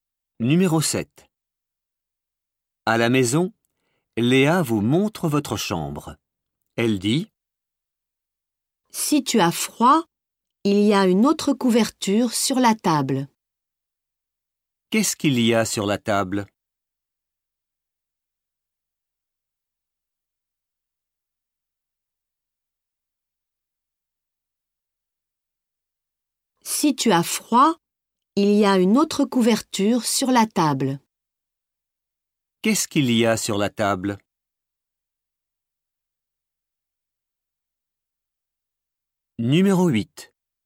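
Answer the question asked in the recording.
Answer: Une autre couverture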